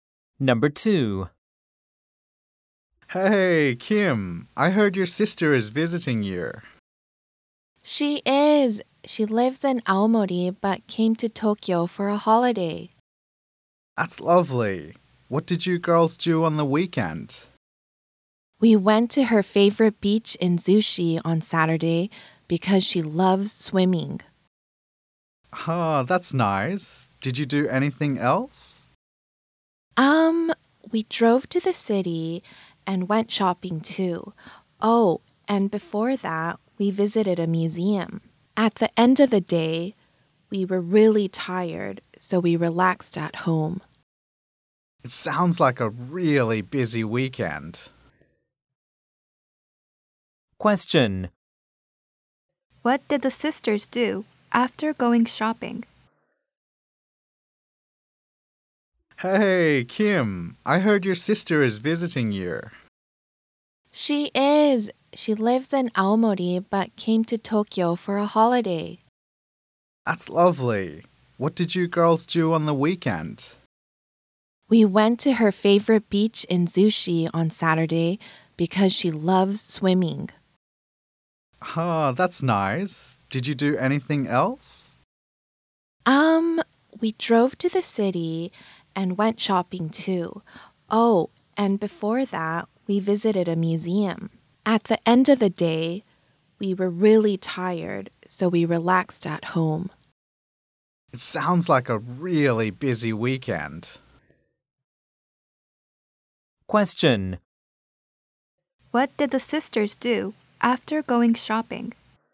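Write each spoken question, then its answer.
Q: What did the sisters do after going shopping?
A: They relaxed at home.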